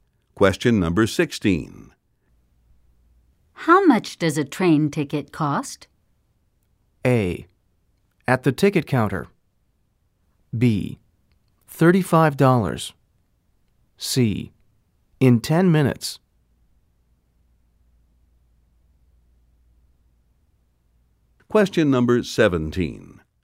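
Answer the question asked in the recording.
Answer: B: $35.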